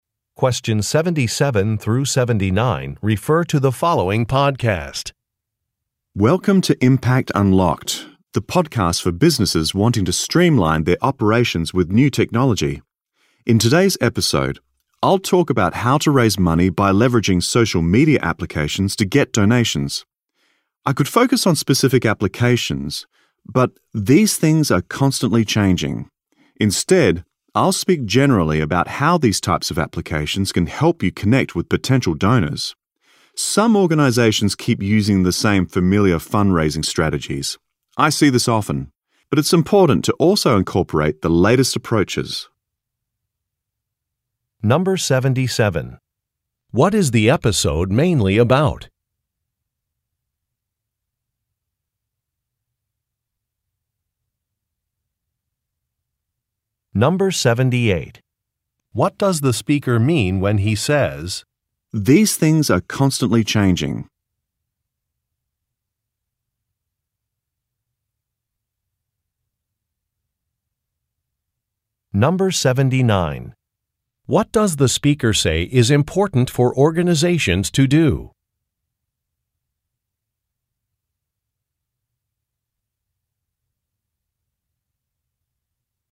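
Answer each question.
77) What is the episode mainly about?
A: Raising money through social media applications

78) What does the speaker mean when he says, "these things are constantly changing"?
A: He will not talk about specific applications

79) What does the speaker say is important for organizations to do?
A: Incorporate the latest approaches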